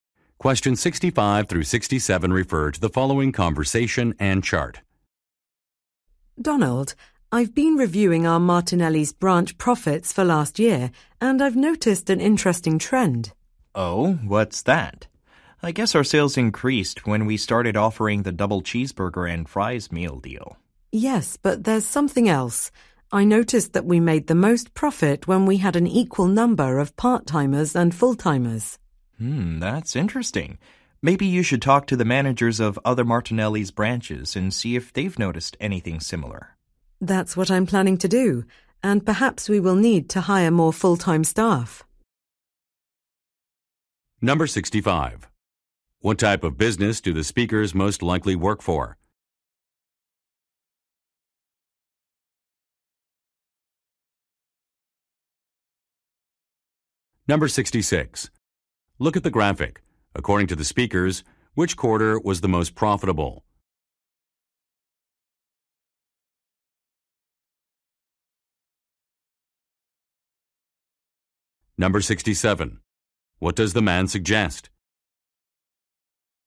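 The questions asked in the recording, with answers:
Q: What type of business do the speakers most likely work for?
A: A fast-food restaurant

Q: What does the man suggest?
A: Talking to the managers of other branches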